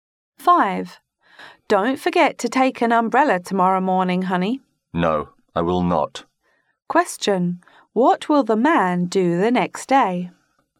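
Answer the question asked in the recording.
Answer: Take an umbrella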